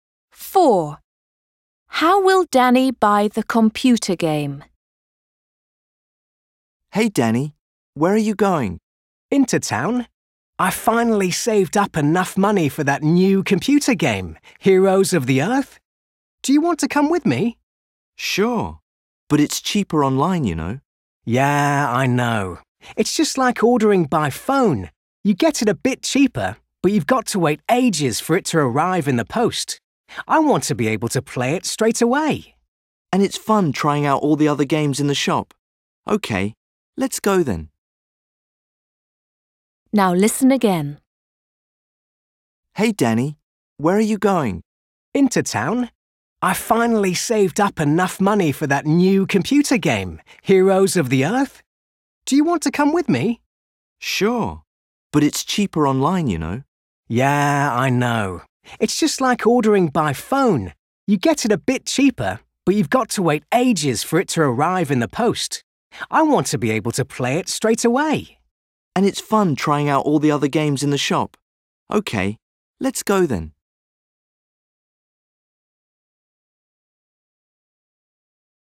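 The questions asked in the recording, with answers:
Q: How will Danny buy the computer game?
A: in a shop in town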